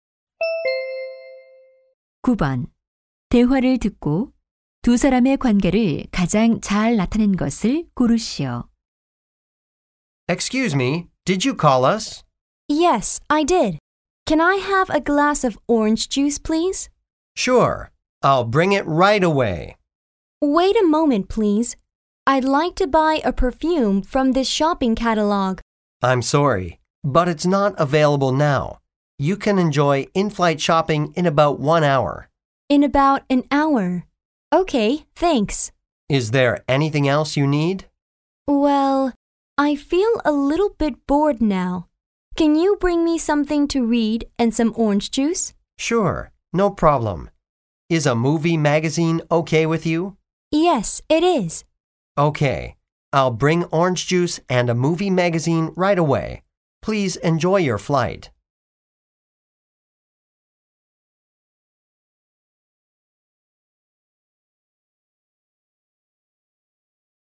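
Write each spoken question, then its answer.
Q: 대화를 듣고 두 사람의 관계를 가장 잘 나타낸 것을 고르시오.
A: 승무원 - 승객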